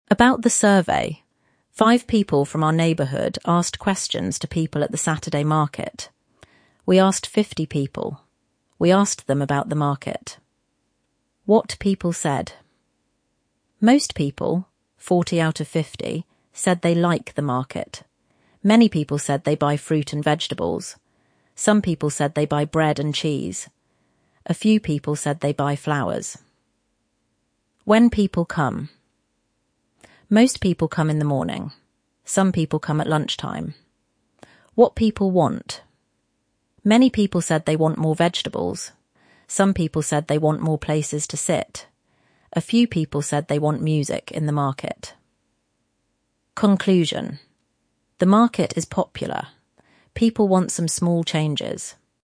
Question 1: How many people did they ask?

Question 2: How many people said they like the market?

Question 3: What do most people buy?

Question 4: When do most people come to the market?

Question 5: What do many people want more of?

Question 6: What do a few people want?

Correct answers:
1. 50 people.
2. 40 out of 50 — most people.
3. Fruit and vegetables.
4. In the morning.
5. Vegetables.
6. Music in the market.

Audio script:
ABOUT THE SURVEY
Five people from our neighbourhood asked questions to people at the Saturday market.
We asked 50 people. We asked them about the market.
WHAT PEOPLE SAID
Most people (40 out of 50) said they like the market.
Many people said they buy fruit and vegetables.
Some people said they buy bread and cheese.
A few people said they buy flowers.
WHEN PEOPLE COME
Most people come in the morning.
Some people come at lunch time.
WHAT PEOPLE WANT
Many people said they want more vegetables.
Some people said they want more places to sit.
A few people said they want music in the market.
CONCLUSION
The market is popular. People want some small changes.